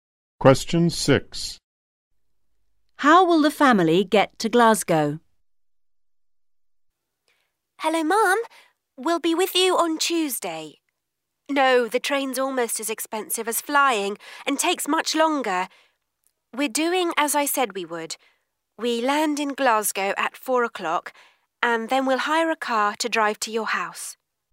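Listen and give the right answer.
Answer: By plane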